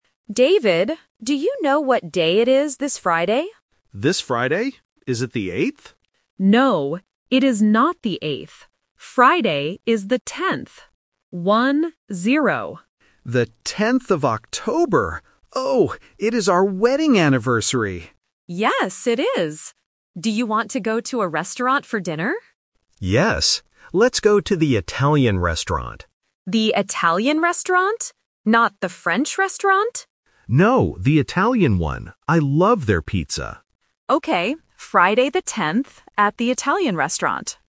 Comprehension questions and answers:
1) What is the date this Friday?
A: The 10th

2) What special day is on Friday?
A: Their wedding anniversary

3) Where are they going for dinner?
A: An Italian restaurant